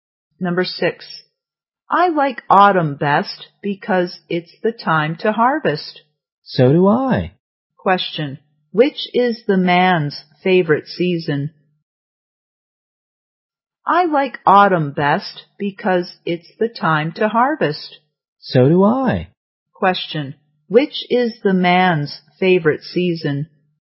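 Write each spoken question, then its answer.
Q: Question, which is the man's favorite season?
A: Autumn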